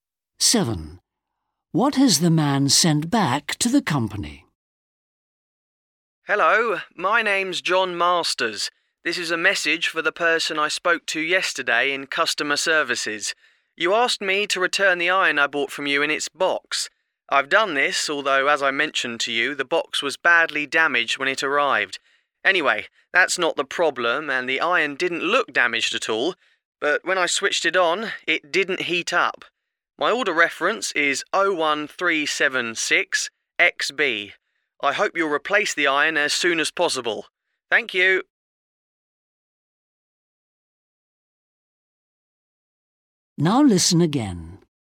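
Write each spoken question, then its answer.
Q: What has the man sent back to the company?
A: the iron in its box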